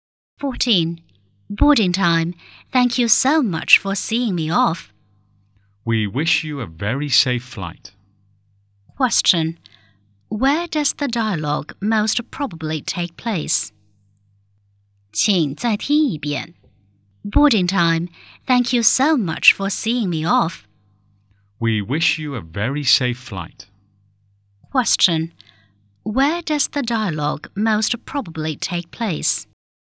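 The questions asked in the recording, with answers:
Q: Where does the dialogue most probably take place?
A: At the airport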